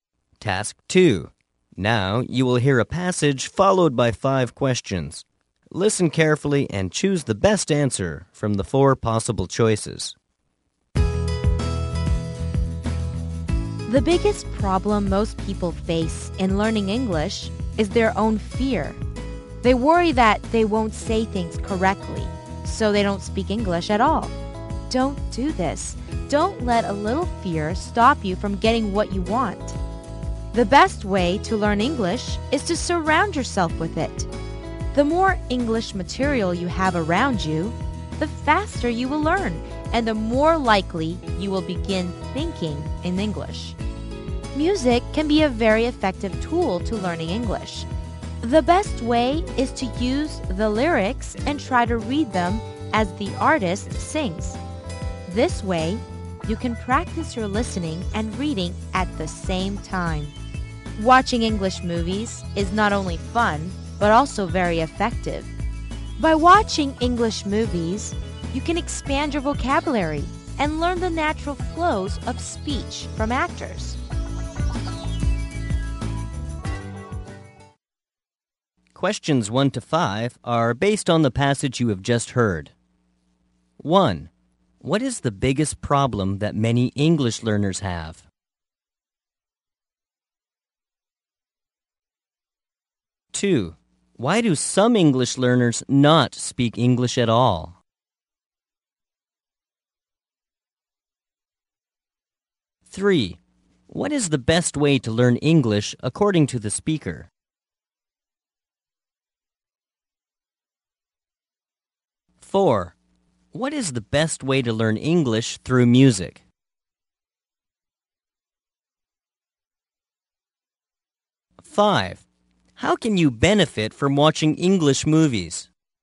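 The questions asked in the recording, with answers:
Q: What is the biggest problem that many English learners have?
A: Their own fear.

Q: Why do some English learners not speak English at all?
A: They worry they won't say things correctly.

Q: What is the best way to learn English according to the speaker?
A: Surround yourself with English.

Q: What is the best way to learn English through music?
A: Read the lyrics as the artist sings.

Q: How can you benefit from watching English movies?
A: Expand your vocabulary and learn the natural flow of speech.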